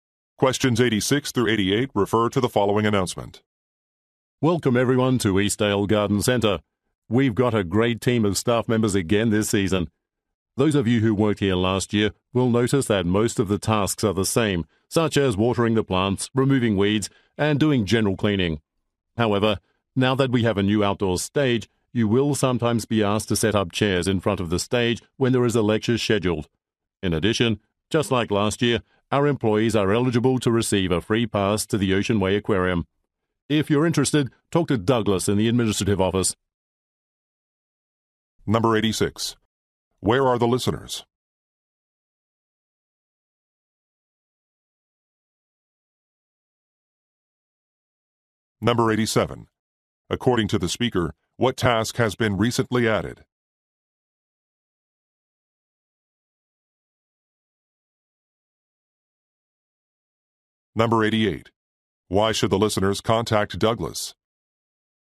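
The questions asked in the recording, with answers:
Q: Where are the listeners?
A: At a garden center

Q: According to the speaker, what task has been recently added?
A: Setting up chairs in front of the outdoor stage

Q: Why should the listeners contact Douglas?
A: To get a free aquarium pass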